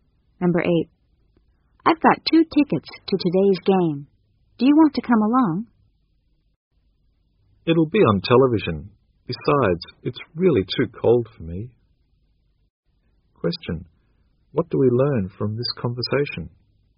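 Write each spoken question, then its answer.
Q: What do we learn from this conversation?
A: The woman won't go to the game; she'll watch it on TV.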